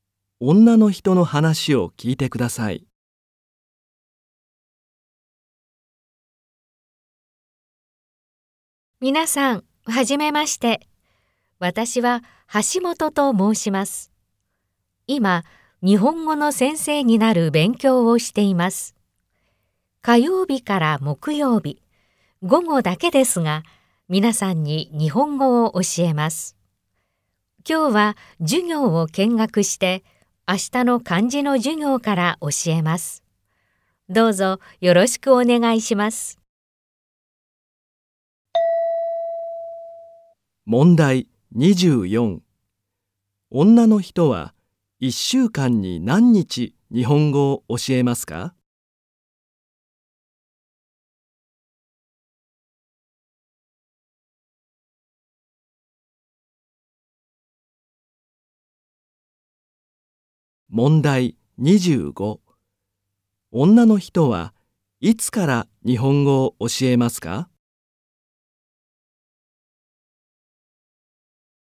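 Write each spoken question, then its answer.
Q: 女の人は1週間に何日日本語を教えますか?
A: 3日

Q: 女の人はいつから日本語を教えますか?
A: 明日(の漢字の授業)から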